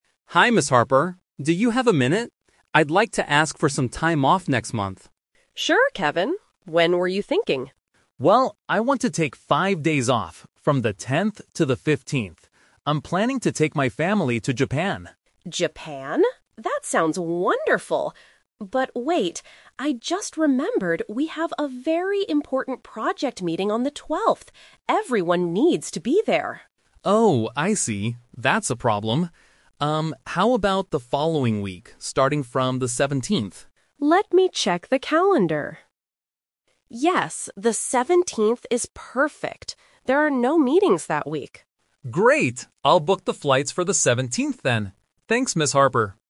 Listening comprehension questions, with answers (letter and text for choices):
Listen to a conversation between an employee, Kevin, and his manager, Ms. Harper. Choose the correct answer (A, B, or C) for each question.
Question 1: Where is Kevin planning to go with his family?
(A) To a local beach.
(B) To another country.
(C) To a big project meeting.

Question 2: Why can't Kevin leave on the 10th of next month?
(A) Because his manager is on holiday.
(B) Because the flights are too expensive that day.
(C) Because there is a mandatory meeting on the 12th.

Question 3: When will Kevin's holiday finally start?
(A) On the 10th.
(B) On the 12th.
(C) On the 17th.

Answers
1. (B) To another country.
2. (C) Because there is a mandatory meeting on the 12th.
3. (C) On the 17th.

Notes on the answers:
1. Kevin says he is taking his family to "Japan", which is another country. Option (A) is not mentioned. Option (C) is a trap because the meeting is at work, not a holiday destination.
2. Ms. Harper says they have an "important project meeting on the 12th" and "everyone needs to be there." This makes the meeting mandatory (bắt buộc). Option (A) and (B) are not mentioned in the audio.
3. This is the Twist. Kevin first asks for the 10th, but after hearing about the meeting, he suggests "starting from the 17th" and Ms. Harper agrees. Option (A) was his first choice but was rejected. Option (B) is the date of the meeting.

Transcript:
Harper. Do you have a minute? I'd like to ask for some time off next month.
Ms. Harper: Sure, Kevin. When were you thinking?
Kevin: Well, I want to take five days off, from the 10th to the 15th. I'm planning to take my family to Japan.
Harper: Japan? That sounds wonderful! But wait... I just remembered we have a very important project meeting on the 12th. Everyone needs to be there.
Kevin: Oh, I see. That's a problem. how about the following week, starting from the 17th?
Harper: Let me check the calendar... Yes, the 17th is perfect. There are no meetings that week.